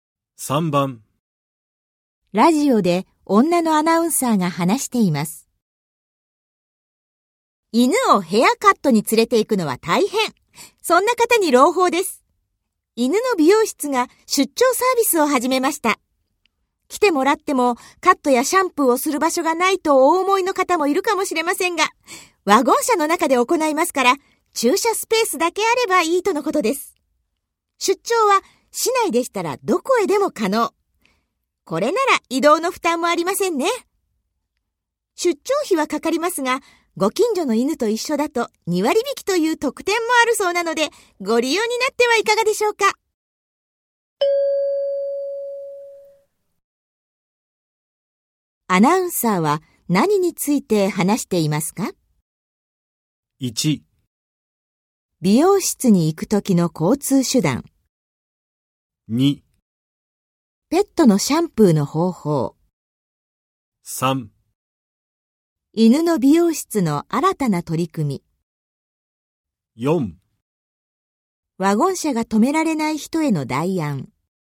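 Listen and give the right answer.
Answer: 3: 犬の美容室の新たな取り組み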